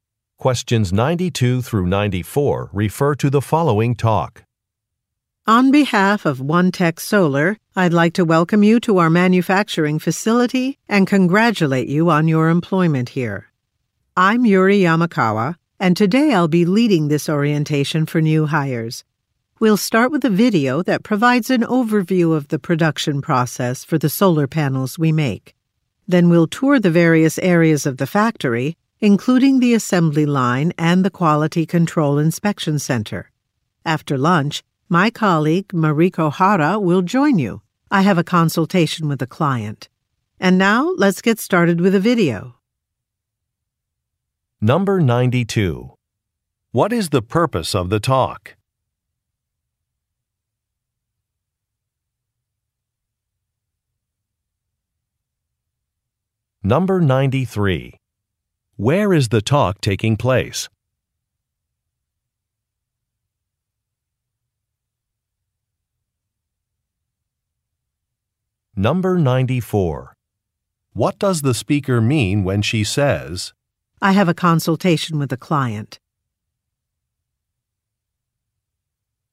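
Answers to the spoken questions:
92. To give an orientation for new employees
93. At a solar panel factory
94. She will not be with them after lunch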